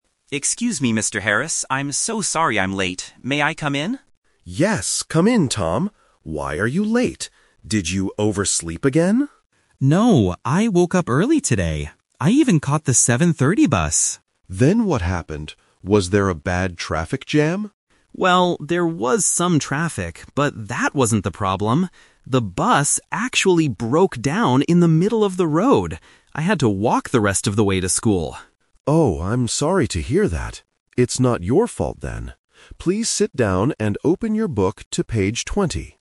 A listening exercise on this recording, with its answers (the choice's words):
Listen to the conversation between a student who is late and a teacher, then choose the best answer (A, B, or C) for each question below.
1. Why is Tom late for class?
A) He woke up late.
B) There was a traffic jam.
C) His bus broke down.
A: His bus broke down.

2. How did Tom finally get to school?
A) On foot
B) By a different bus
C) By car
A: On foot

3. What does Mr. Harris tell Tom to do at the end?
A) Go to the school office.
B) Open his book.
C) Do extra homework.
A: Open his book.

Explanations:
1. Tom explains the real reason: "The bus actually broke down in the middle of the road!" Why the traps are wrong: Option (A) is "The Trap". Mr. Harris asks if he overslept, but Tom rejects it saying, "No, I woke up early today." Option (B) is "The Twist Trap". Mr. Harris asks about a traffic jam, and Tom says there was some traffic, but that wasn't the main problem.
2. Tom says, "I had to walk the rest of the way to school." (Walking means going on foot). Why the traps are wrong: Option (B) is a "Plausible Trap". Normally, people might catch another bus if one breaks down, but Tom decided to walk. Option (C) is also plausible but is never mentioned in the audio.
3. Mr. Harris tells Tom, "Please sit down and open your book to page 20." Why the traps are wrong: Options (A) and (C) are plausible punishments or actions for a student who is late to class, but Mr. Harris does not punish Tom because it wasn't his fault.

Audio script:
Tom: Excuse me, Mr. Harris. I'm so sorry I'm late. May I come in?
Mr. Harris: Yes, come in, Tom. Why are you late? Did you oversleep again?
Tom: No, I woke up early today. I even caught the 7:30 bus.
Mr. Harris: Then what happened? Was there a bad traffic jam?
Tom: Well, there was some traffic, but that wasn't the problem. The bus actually broke down in the middle of the road! I had to walk the rest of the way to school.
Mr. Harris: Oh, I'm sorry to hear that.